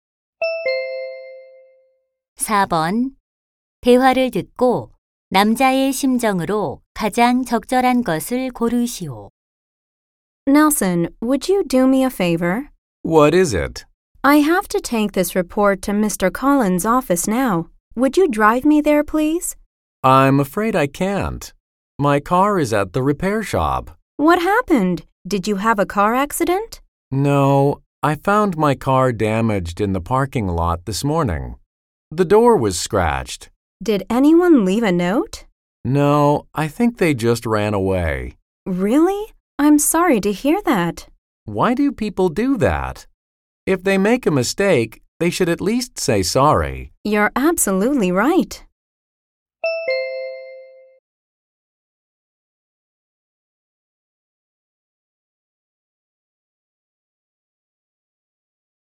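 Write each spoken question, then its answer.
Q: 대화를 듣고 남자의 심정으로 가장 적절한 것을 고르시오.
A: 화가 나고 속상함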